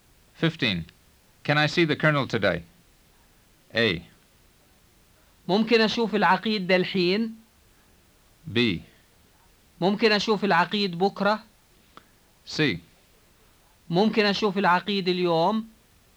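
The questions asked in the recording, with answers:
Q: Can I see the colonel today?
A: C: ممكن أشوف العقيد اليوم.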